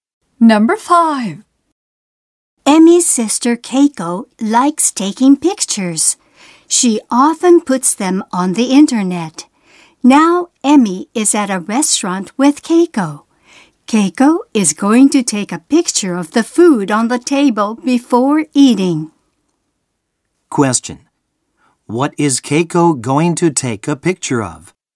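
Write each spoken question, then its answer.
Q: What is Keiko going to take a picture of?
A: The food on the table.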